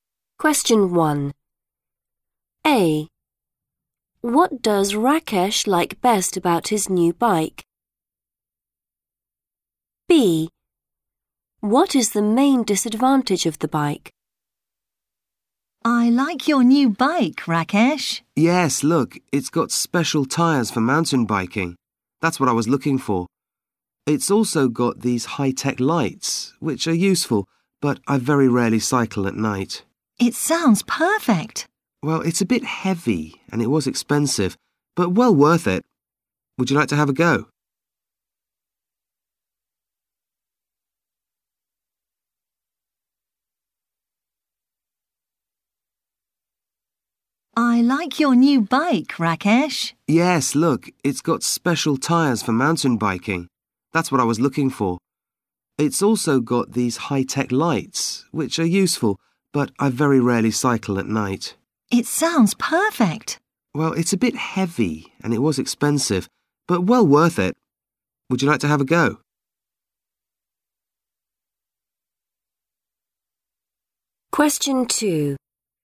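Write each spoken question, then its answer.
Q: What does Rakesh like best about his new bike?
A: special tyres for mountain biking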